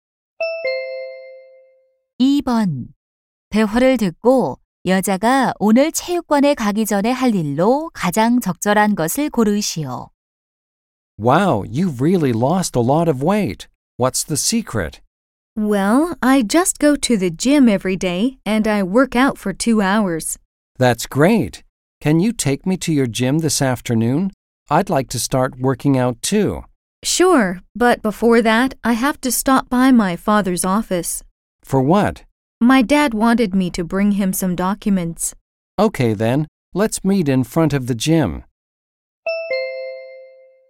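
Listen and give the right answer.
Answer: 아버지 사무실에 서류 갖다 드리기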